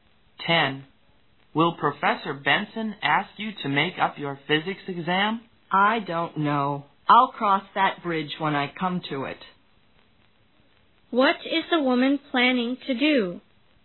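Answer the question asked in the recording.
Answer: Deal with the make-up exam only when it happens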